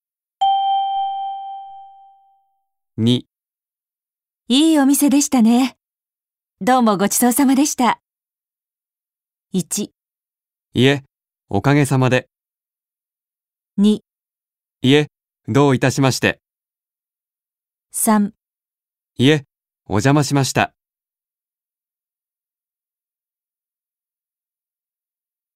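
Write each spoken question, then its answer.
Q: いいお店でしたね。どうもごちそうさまでした。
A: 2: いえ、どういたしまして。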